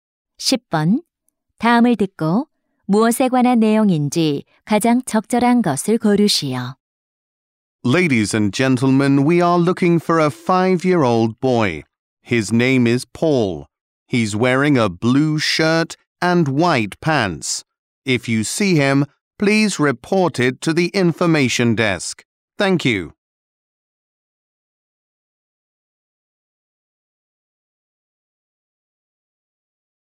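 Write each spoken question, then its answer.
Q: 다음을 듣고 무엇에 관한 내용인지 가장 적절한 것을 고르시오.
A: 미아 찾기 안내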